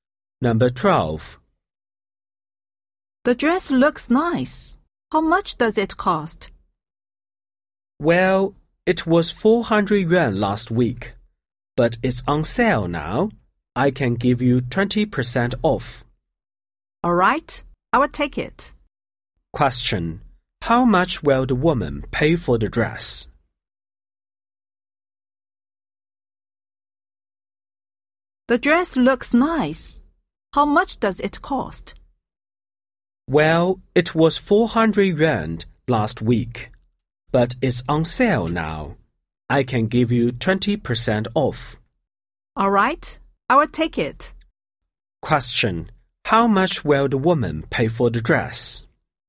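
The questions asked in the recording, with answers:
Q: How much will the woman pay for the dress?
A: 320 yuan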